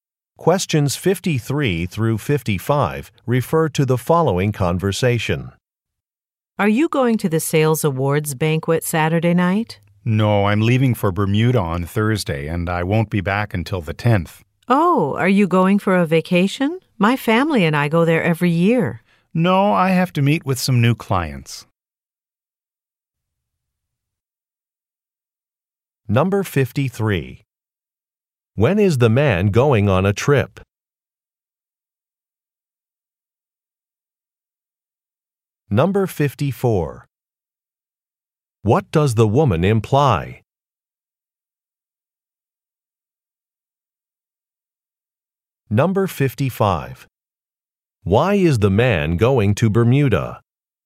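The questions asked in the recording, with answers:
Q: When is the man going on a trip?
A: On Thursday

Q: What does the woman imply?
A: She has been to Bermuda before; her family goes there every year

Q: Why is the man going to Bermuda?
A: To meet with some new clients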